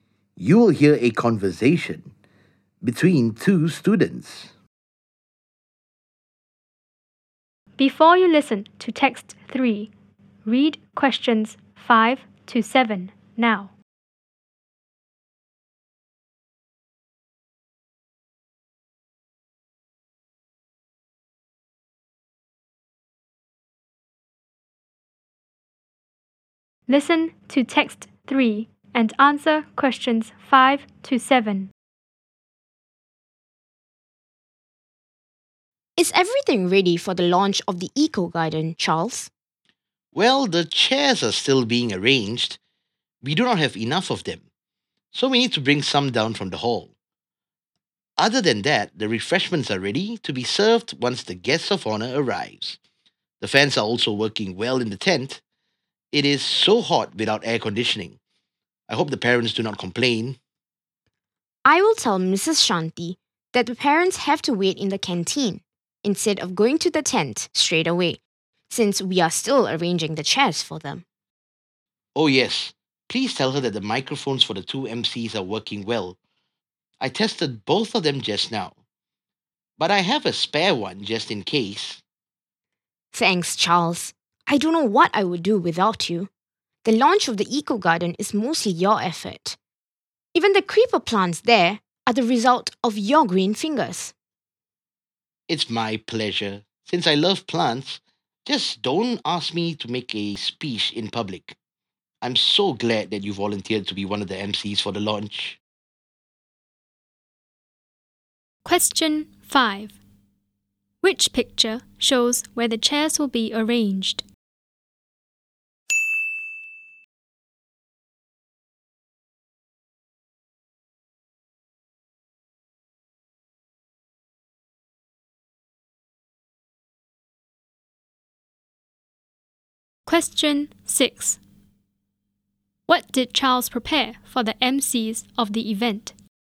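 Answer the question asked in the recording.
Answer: Microphones (two tested, plus a spare one)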